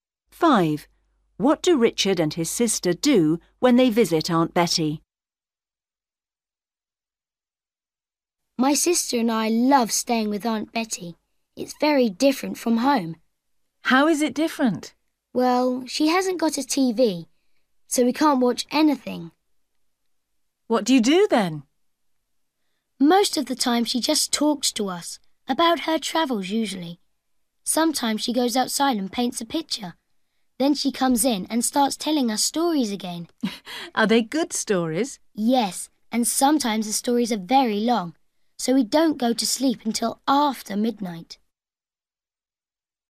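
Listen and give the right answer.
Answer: Listen to her stories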